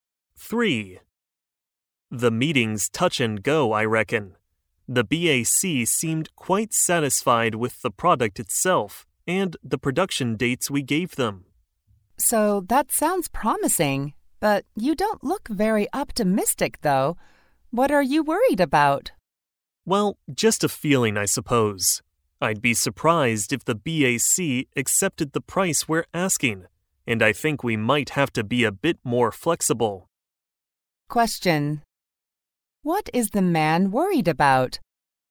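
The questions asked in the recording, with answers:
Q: What is the man worried about?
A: That the BAC won't accept the price they're asking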